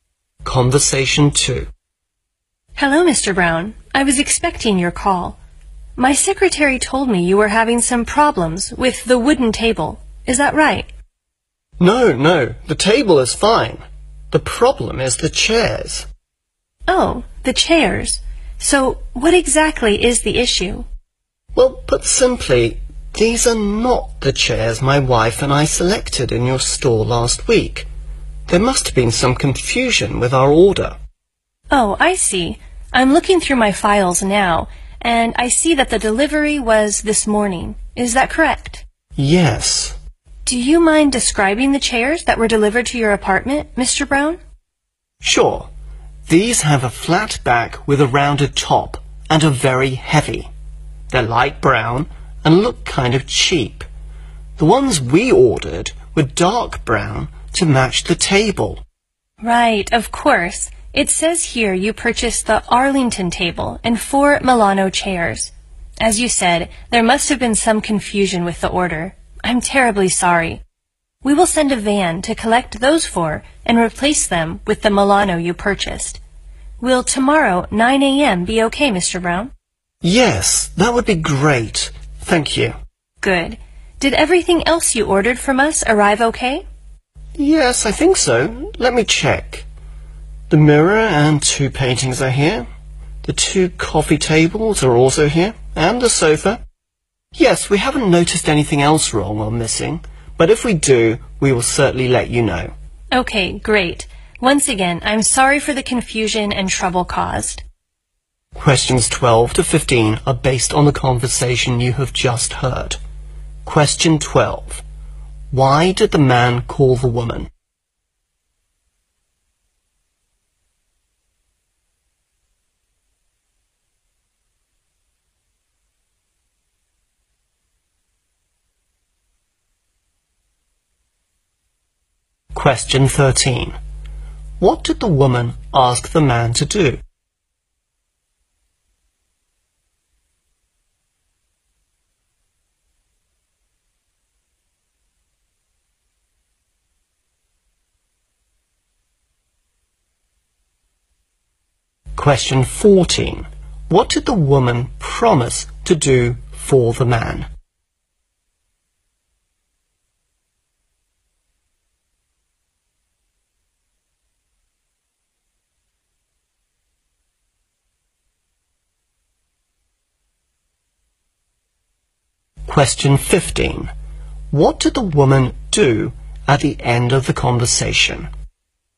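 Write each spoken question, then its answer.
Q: Why did the man call the woman?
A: The wrong chairs were delivered

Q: What did the woman ask the man to do?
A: Describe the chairs that were delivered

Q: What did the woman promise to do for the man?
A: Collect the chairs and replace them with the Milano chairs

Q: What did the woman do at the end of the conversation?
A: She apologized for the confusion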